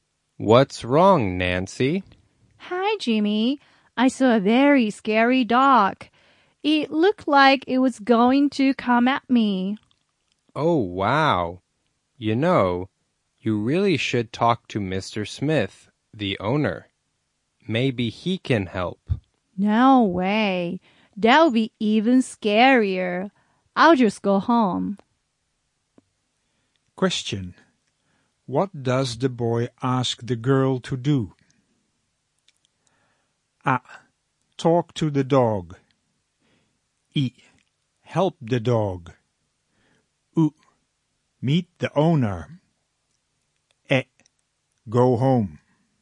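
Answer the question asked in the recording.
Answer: う: Meet the owner.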